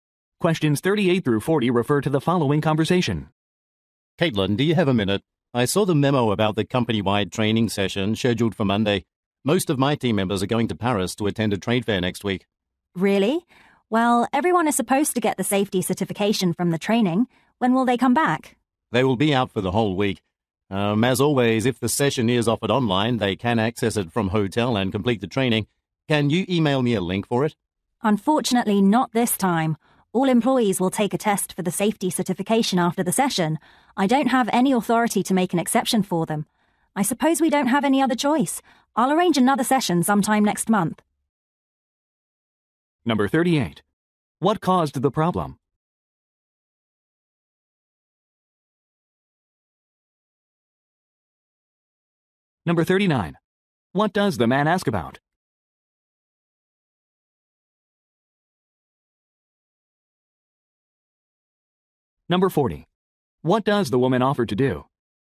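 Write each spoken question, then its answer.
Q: What caused the problem?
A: Team members will be at a trade fair in Paris during the training

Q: What does the man ask about?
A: Whether the training is offered online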